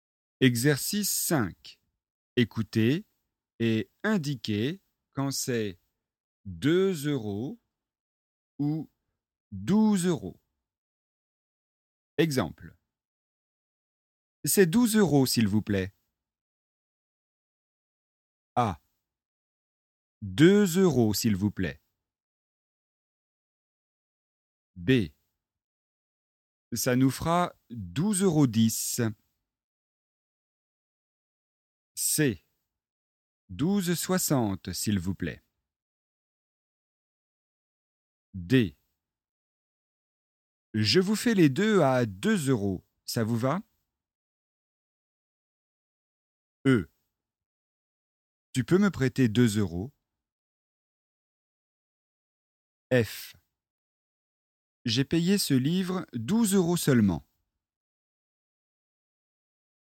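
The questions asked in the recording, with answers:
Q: 2 euros, s'il vous plaît.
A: 2 euros

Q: Ça nous fera 12,10 €.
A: 12 euros

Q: 12,60 €, s'il vous plaît.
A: 12 euros

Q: Je vous fais les deux à 2 euros, ça vous va?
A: 2 euros

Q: Tu peux me prêter 2 euros?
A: 2 euros

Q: J'ai payé ce livre 12 euros seulement.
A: 12 euros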